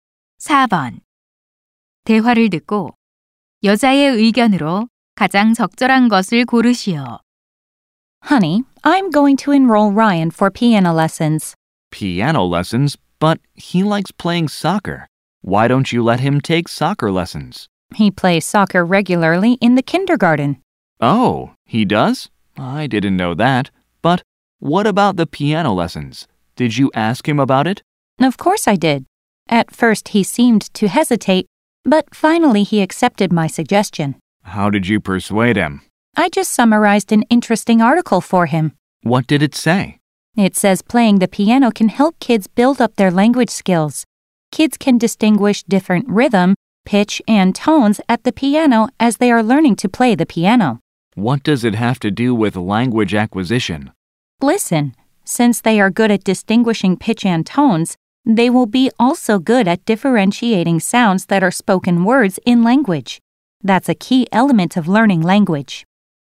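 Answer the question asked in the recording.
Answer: 피아노 연주는 아이들의 언어 능력 발달에 도움이 된다.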